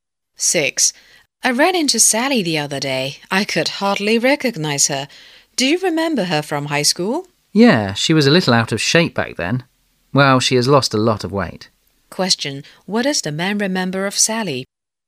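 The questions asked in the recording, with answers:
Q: What does the man remember of Sally?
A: She was a little overweight (out of shape) in high school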